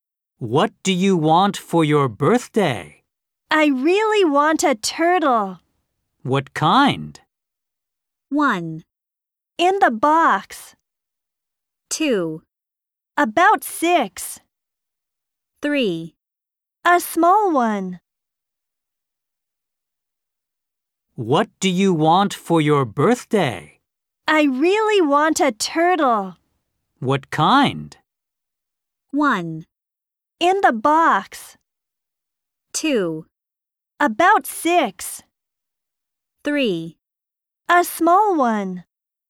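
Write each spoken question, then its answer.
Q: What kind?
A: 3: A small one.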